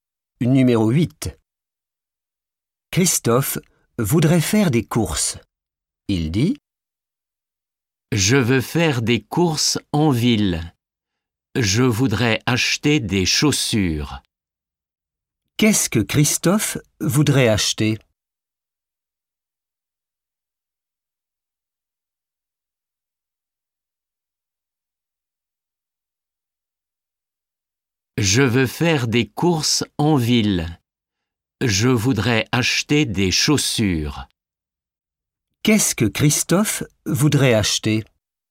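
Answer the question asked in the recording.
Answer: des chaussures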